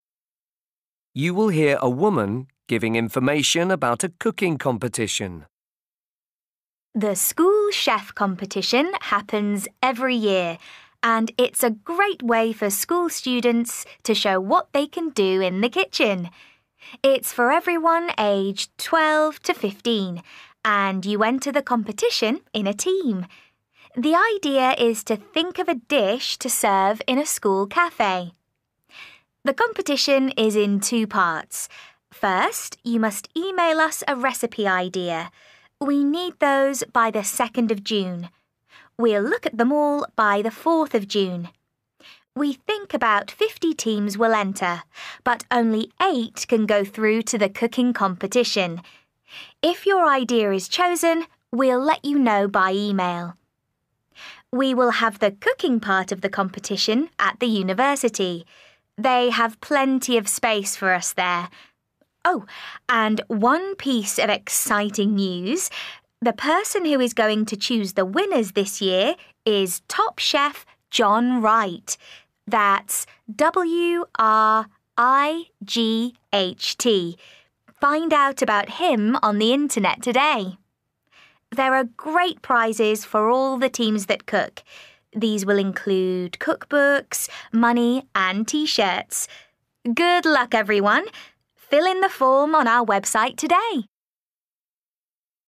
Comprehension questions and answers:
1. For each question, write the correct answer in the gap. Write one word or a number or a date or a time.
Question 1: Last date to enter: (1).............. June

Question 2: Number of teams: (2)..............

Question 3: Where competition will be: (3) the ..............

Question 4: Name of chef: (4) John ..............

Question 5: Prizes: (5) T-shirts, cookbooks and .................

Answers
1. 2nd/2/second
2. 8/eight
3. university
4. Wright
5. money

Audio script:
You will hear a woman giving information about a cooking competition.
Woman: The School Chef Competition happens every year, and it's a great way for school students to show what they can do in the kitchen! It's for everyone aged 12 to 15, and you enter the competition in a team. The idea is to think of a dish to serve in a school café.
The competition is in two parts. First you must email us a recipe idea. We need those by 2nd June. We'll look at them all by 4th June. We think about 50 teams will enter, but only eight can go through to the cooking competition. If your idea is chosen, we'll let you know by email.
We will have the cooking part of the competition at the university. They have plenty of space for us there. Oh – and one piece of exciting news – the person who is going to choose the winners this year is top chef John Wright. That's W-R-I-G-H-T. Find out about him on the internet today!
There are great prizes for all the teams that cook. These will include cookbooks, money and T-shirts. Good luck, everyone – fill in the form on our website today!